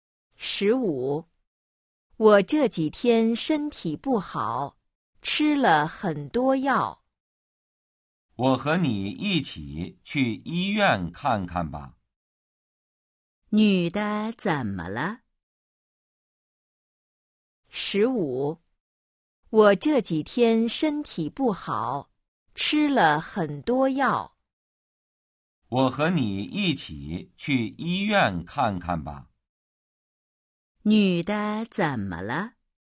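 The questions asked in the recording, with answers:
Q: 女的怎么了?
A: 身体不好,吃了很多药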